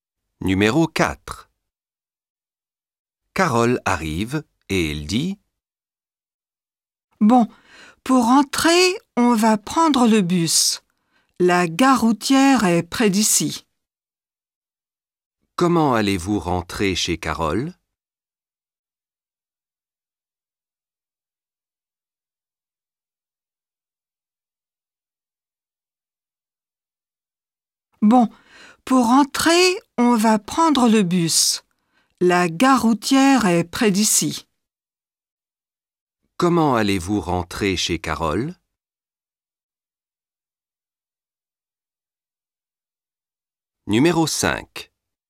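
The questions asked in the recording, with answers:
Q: Comment allez-vous rentrer chez Carole?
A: En bus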